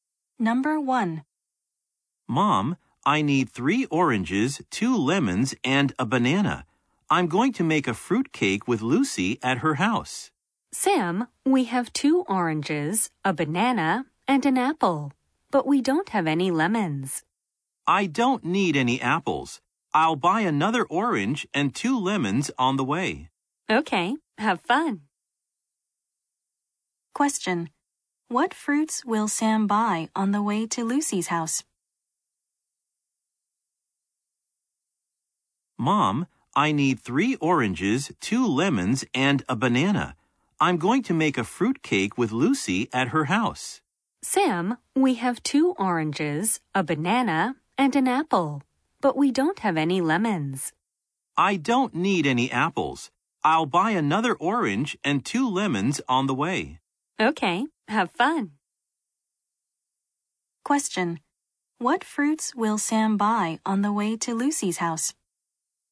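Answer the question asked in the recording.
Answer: An orange and two lemons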